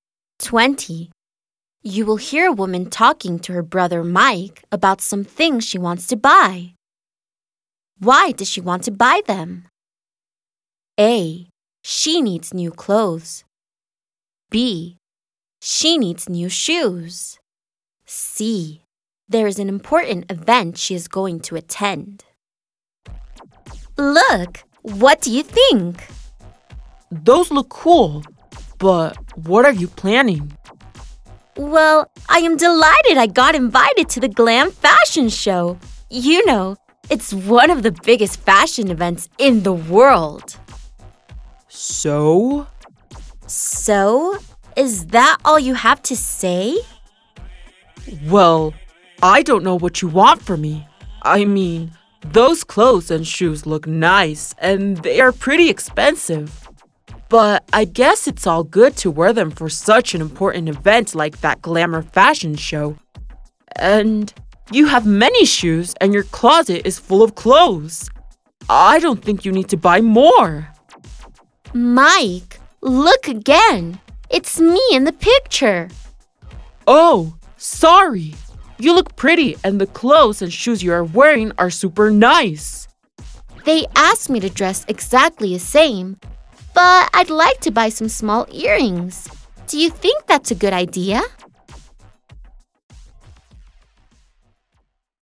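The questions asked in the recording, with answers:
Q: Why does she want to buy them?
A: C: There is an important event she is going to attend.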